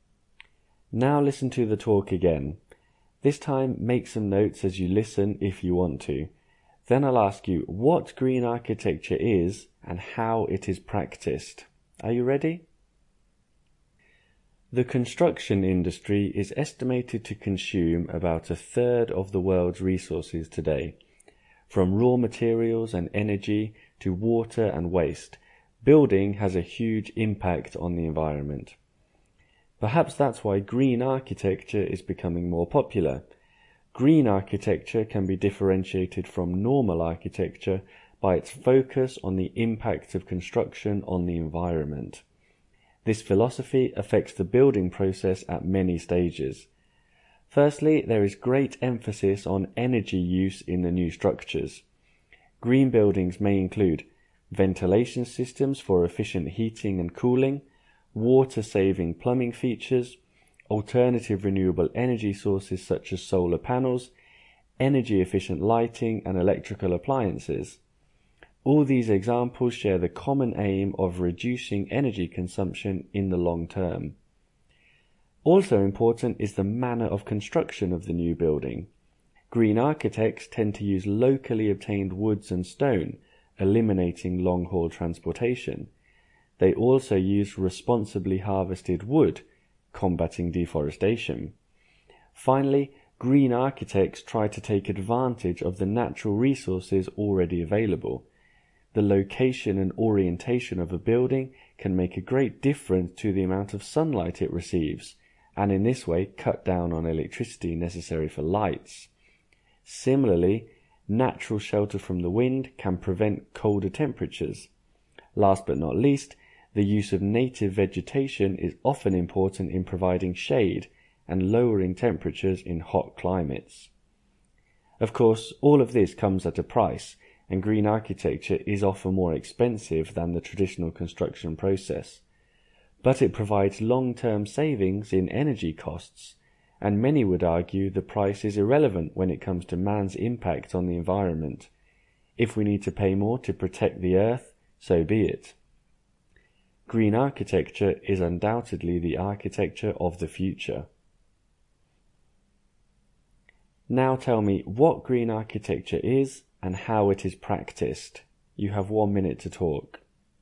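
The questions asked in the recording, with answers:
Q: Now tell me what green architecture is and how it is practiced.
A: Architecture focused on reducing construction's environmental impact: energy-efficient systems, local and responsibly harvested materials, using natural sunlight, shelter and native vegetation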